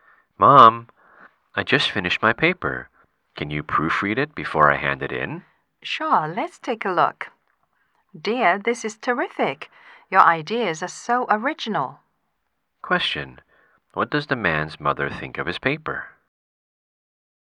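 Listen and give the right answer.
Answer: It is terrific and original.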